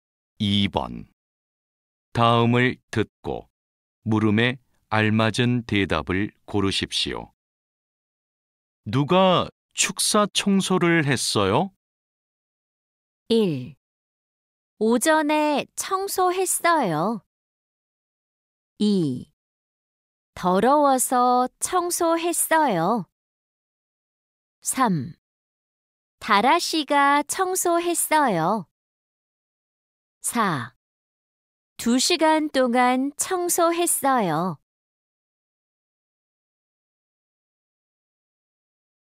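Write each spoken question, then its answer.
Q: 누가 축사 청소를 했어요?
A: 3: 다라 씨가 청소했어요.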